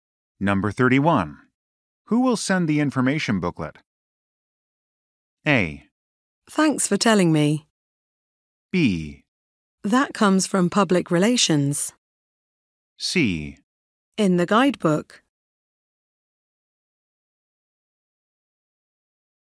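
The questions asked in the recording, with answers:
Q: Who will send the information booklet?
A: B: That comes from public relations.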